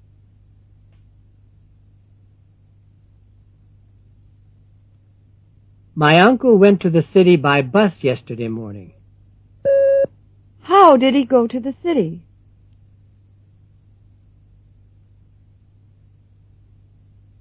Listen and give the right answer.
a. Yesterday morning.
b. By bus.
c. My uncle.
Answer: b. By bus.

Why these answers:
My uncle went to the city by bus yesterday morning. How did he go to the city?

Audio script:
8.My uncle went to the city by bus yesterday morning. How did he go to the city?